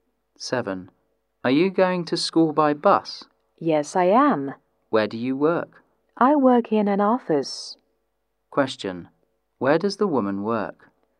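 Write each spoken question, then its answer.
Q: Where does the woman work?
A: In an office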